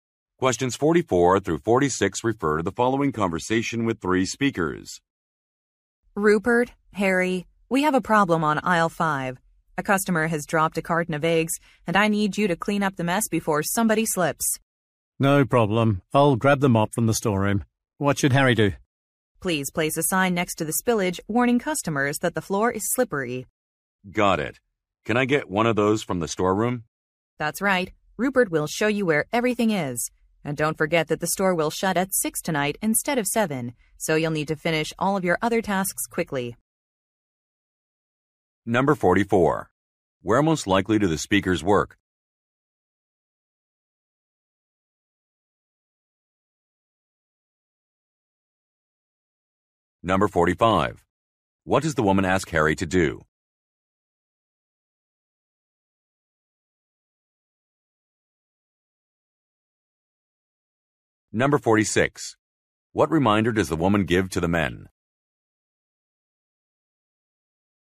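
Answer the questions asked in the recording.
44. At a store (supermarket)
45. Place a warning sign next to the spill
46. The store will close early, at 6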